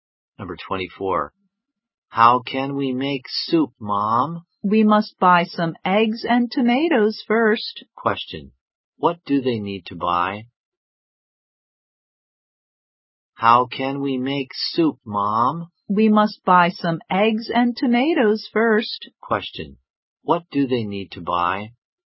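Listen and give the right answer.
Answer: Eggs and tomatoes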